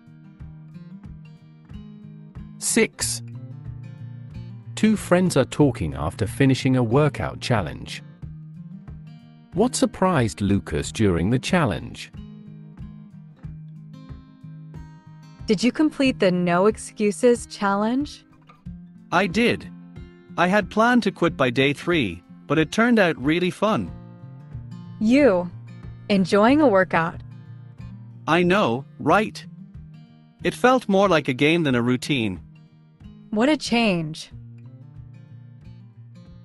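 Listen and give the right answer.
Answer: It turned out to be really fun.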